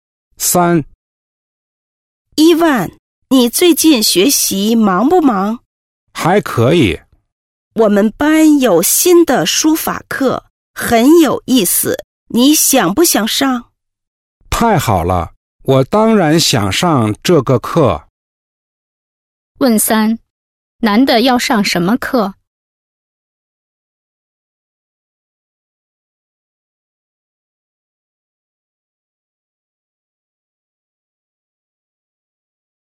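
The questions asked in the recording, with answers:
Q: 男的要上什么课?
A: 书法课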